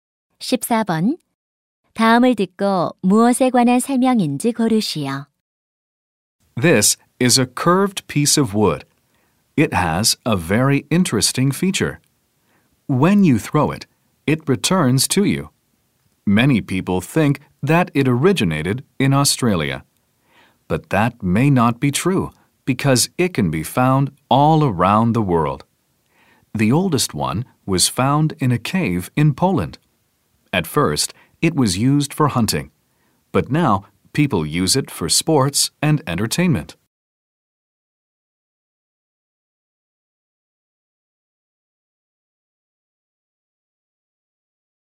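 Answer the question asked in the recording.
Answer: 부메랑 (boomerang)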